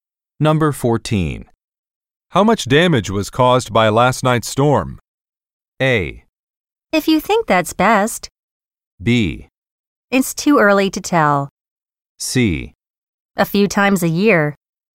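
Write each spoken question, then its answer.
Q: How much damage was caused by last night's storm?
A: B: It's too early to tell.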